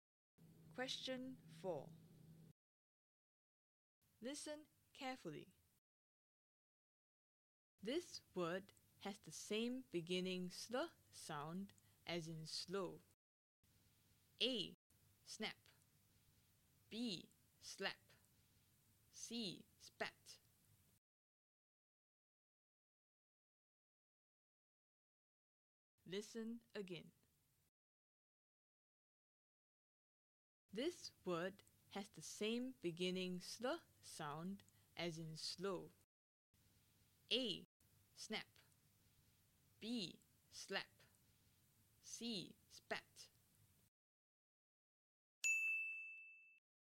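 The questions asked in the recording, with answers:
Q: This word has the same beginning sl sound as in slow.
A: B: Slap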